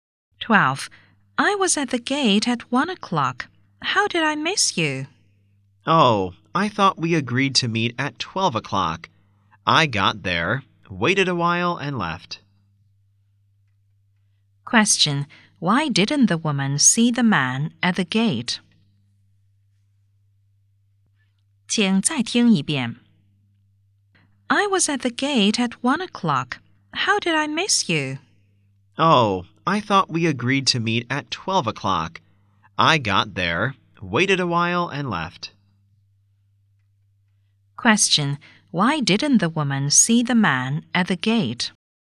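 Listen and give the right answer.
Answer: She thought they would meet at 12 o'clock, waited a while and left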